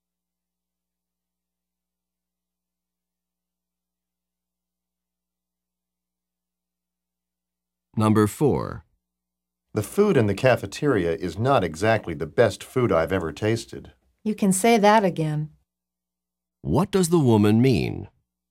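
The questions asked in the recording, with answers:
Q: What does the woman mean?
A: She agrees the cafeteria food is not very good.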